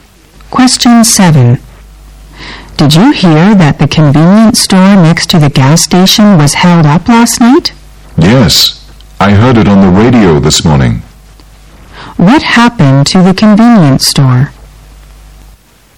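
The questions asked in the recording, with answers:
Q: What happened to the convenience store?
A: It was robbed last night.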